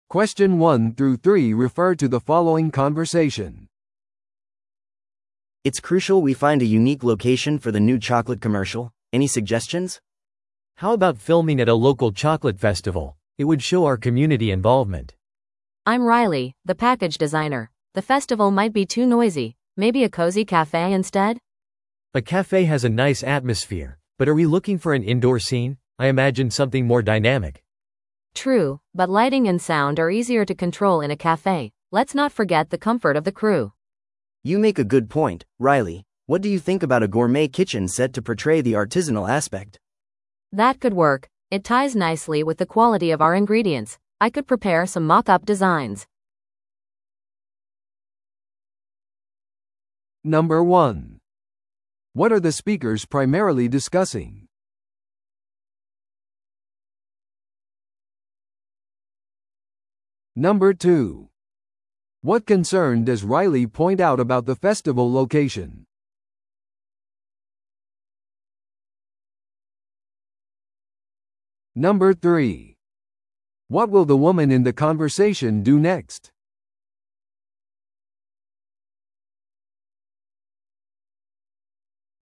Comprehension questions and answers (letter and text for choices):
Listen to the audio below and answer the questions.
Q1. What are the speakers primarily discussing?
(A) コマーシャルの撮影場所を選ぶ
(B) 地元のフェスティバルイベントの計画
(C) チョコレートのパッケージデザインを再設計する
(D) チームミーティングのための新しいカフェを探す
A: (A) コマーシャルの撮影場所を選ぶ

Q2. What concern does Riley point out about the festival location?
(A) レンタル料が高すぎる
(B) 人で混雑していすぎる可能性がある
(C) 撮影にはうるさすぎるかもしれない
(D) 彼らのブランドをうまく表現しない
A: (C) 撮影にはうるさすぎるかもしれない

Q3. What will the woman in the conversation do next?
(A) 地元のチョコレートフェスティバルに参加する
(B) キッチンセットのモックアップデザインを用意する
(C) 自分でコマーシャルを撮影する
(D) カフェでチームミーティングを組織する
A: (B) キッチンセットのモックアップデザインを用意する

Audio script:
A: It's crucial we find a unique location for the new chocolate commercial. Any suggestions?
B: How about filming at a local chocolate festival? It would show our community involvement.
C: I'm Riley, the package designer. The festival might be too noisy. Maybe a cozy café instead?
B: A café has a nice atmosphere, but are we looking for an indoor scene? I imagined something more dynamic.
C: True, but lighting and sound are easier to control in a café. Let's not forget the comfort of the crew.
A: You make a good point, Riley. What do you think about a gourmet kitchen set to portray the artisanal aspect?
C: That could work! It ties nicely with the quality of our ingredients. I could prepare some mock-up designs.